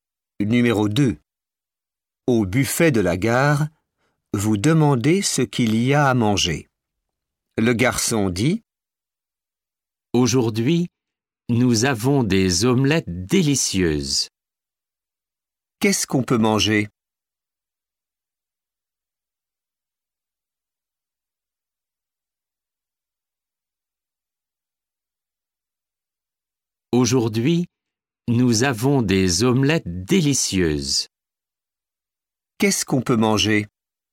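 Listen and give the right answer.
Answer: Des omelettes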